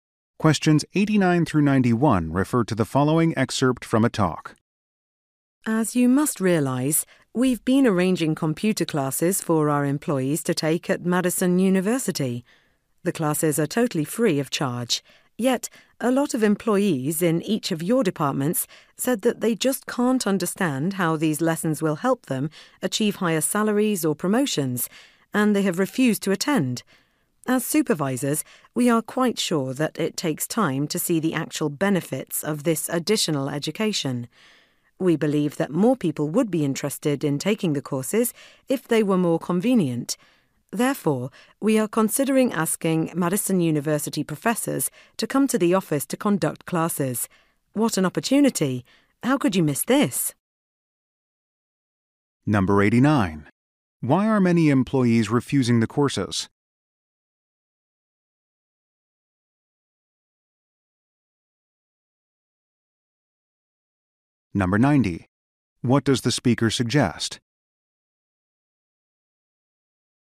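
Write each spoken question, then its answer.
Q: Why are many employees refusing the courses?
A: They don't see how it helps them get raises or promotions

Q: What does the speaker suggest?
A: Having professors teach classes at the office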